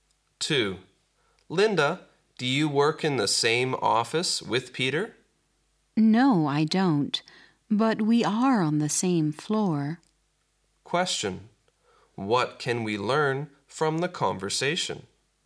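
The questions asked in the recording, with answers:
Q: What can we learn from the conversation?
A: Linda and Peter work on the same floor but not in the same office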